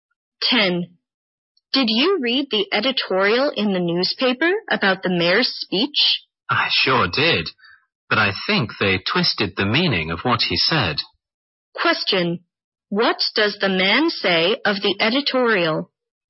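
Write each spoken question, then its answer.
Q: What does the man say of the editorial?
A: It twisted the meaning of the mayor's speech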